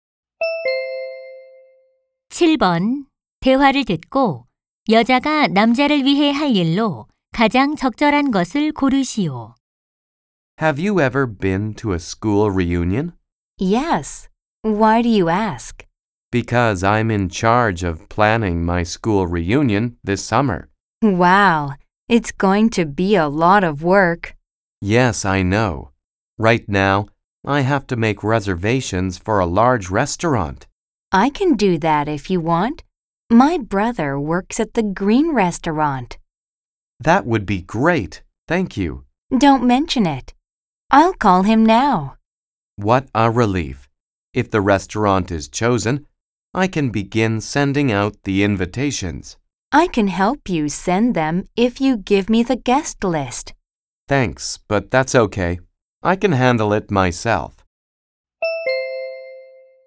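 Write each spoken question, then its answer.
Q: 대화를 듣고 여자가 남자를 위해 할 일로 가장 적절한 것을 고르시오.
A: 식당 예약하기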